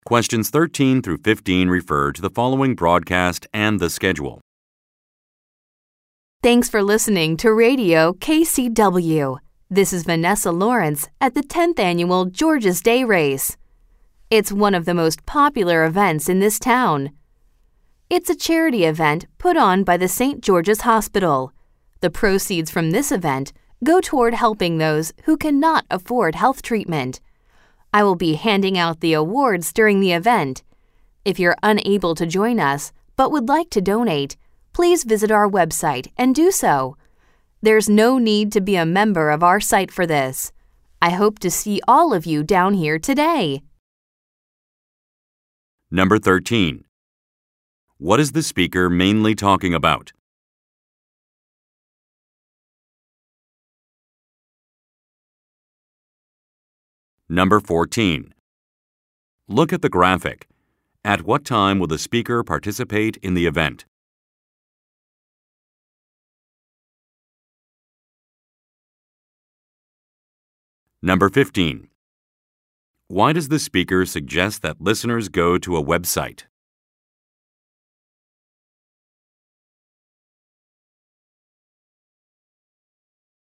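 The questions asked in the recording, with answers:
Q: What is the speaker mainly talking about?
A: A charity race (the George's Day Race) held by St. George's Hospital

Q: Why does the speaker suggest that listeners go to a website?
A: To make a donation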